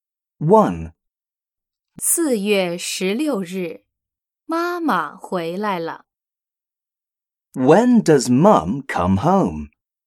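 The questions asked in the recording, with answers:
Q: When does Mum come home?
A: On April 16th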